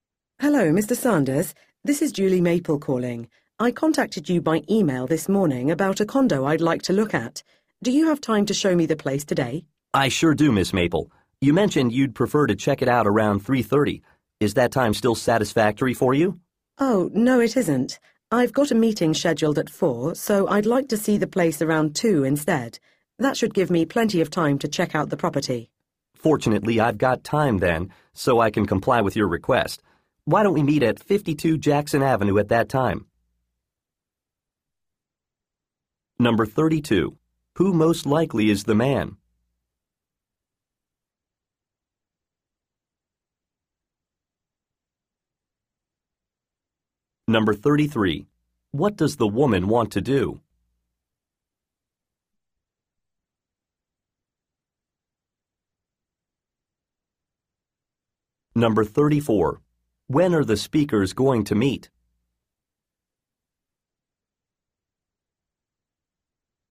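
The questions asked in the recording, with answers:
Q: Who most likely is the man?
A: A real estate agent

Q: When are the speakers going to meet?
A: Around 2 o'clock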